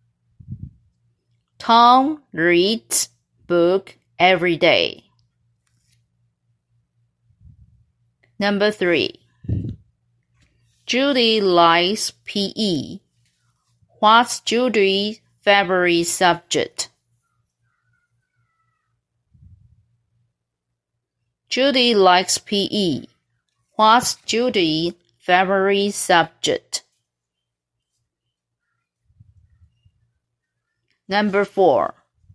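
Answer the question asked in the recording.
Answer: PE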